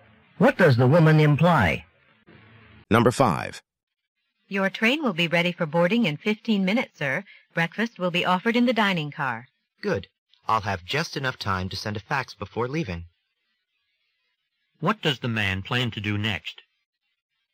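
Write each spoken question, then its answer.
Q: What does the man plan to do next?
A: Send a fax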